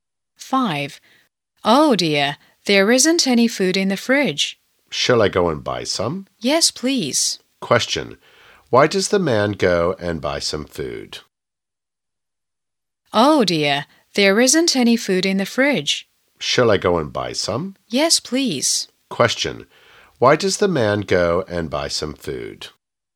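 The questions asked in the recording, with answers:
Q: Question. Why does the man go and buy some food?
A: Because there isn't any food in the fridge.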